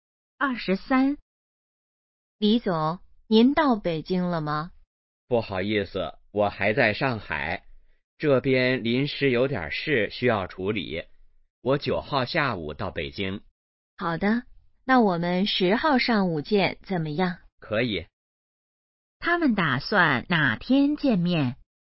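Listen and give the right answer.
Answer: 10号上午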